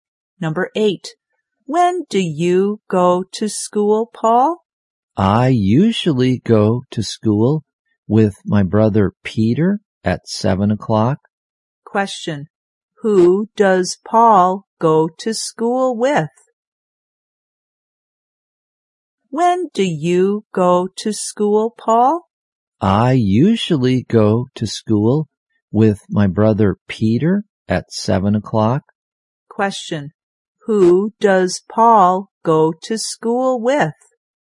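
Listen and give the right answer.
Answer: His brother Peter.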